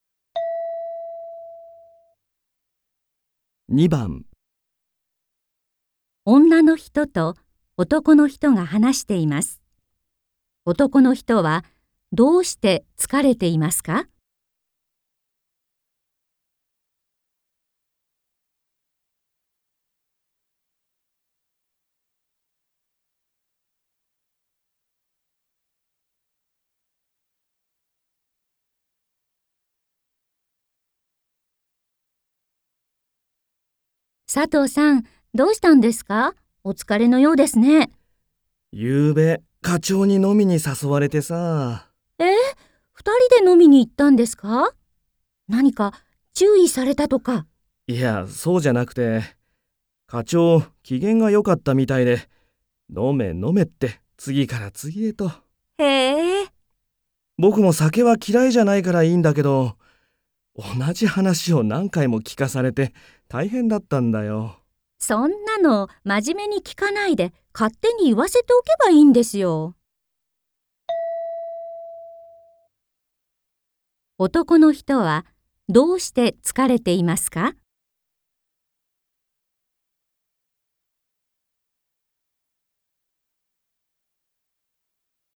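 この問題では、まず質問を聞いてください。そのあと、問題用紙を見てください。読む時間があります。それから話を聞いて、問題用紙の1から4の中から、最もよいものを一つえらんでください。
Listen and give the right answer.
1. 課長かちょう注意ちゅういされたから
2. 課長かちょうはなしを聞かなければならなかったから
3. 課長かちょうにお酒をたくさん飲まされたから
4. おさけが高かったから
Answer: 2. 課長かちょうはなしを聞かなければならなかったから

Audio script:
女の人と男の人が話しています。男の人はどうして疲れていますか。
F:佐藤さん、どうしたんですか。お疲れのようですね。
M:ゆうべ、課長に飲みに誘われてさ...。
F:え、2人で飲みに行ったんですか?何か注意されたとか?
M:いやそうじゃなくて、課長、機嫌がよかったみたいで「飲め、飲め」って次から次へと...。
F:へえ。
M:ぼくも酒は嫌いじゃないからいいんだけど...同じ話を何回も聞かされて、大変だったんだよ。
F:そんなのまじめに聞かないで、勝手に言わせておけばいいんですよ。

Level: N3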